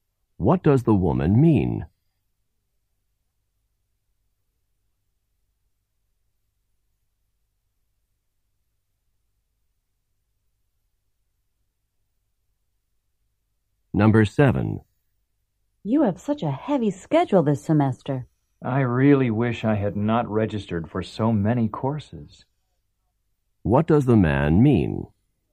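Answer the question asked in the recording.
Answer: He registered for too many courses.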